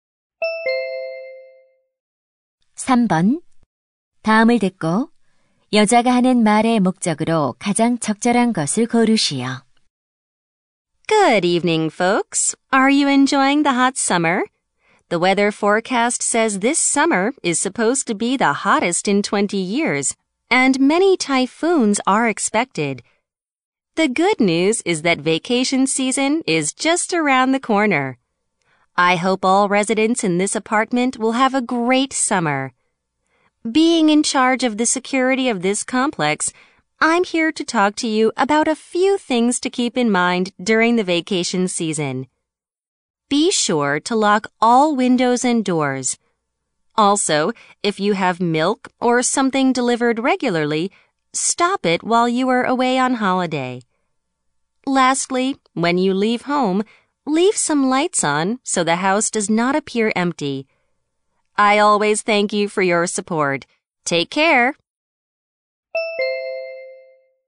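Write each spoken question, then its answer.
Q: 다음을 듣고 여자가 하는 말의 목적으로 가장 적절한 것을 고르시오.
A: 휴가철 보안(도난 예방) 수칙을 안내하려고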